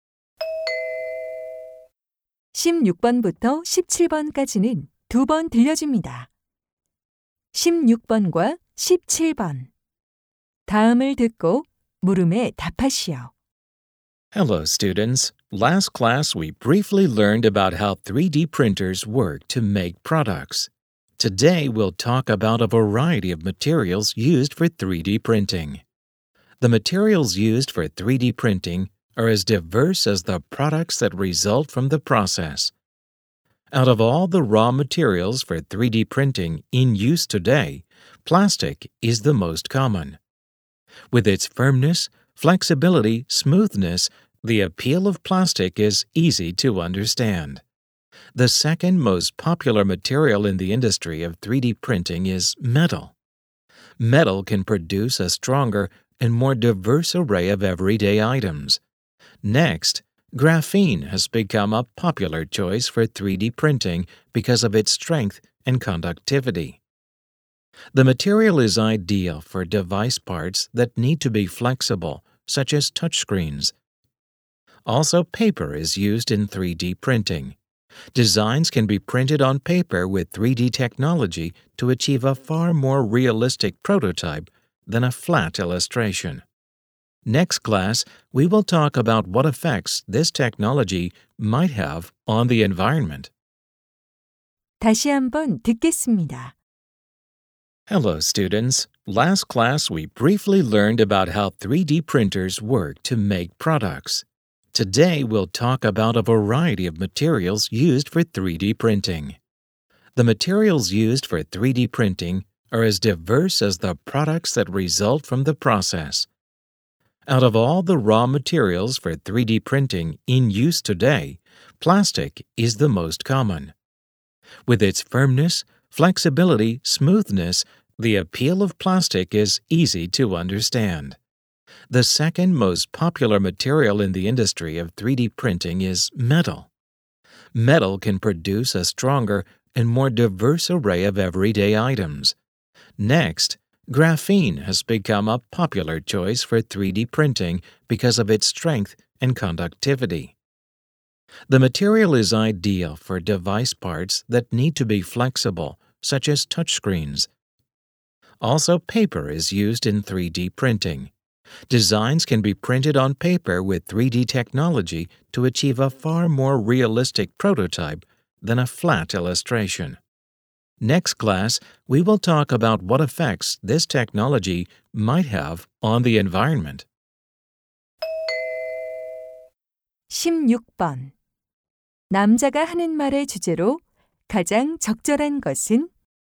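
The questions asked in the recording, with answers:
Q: 남자가 하는 말의 주제로 가장 적절한 것은?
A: 3D 프린팅에 사용되는 다양한 재료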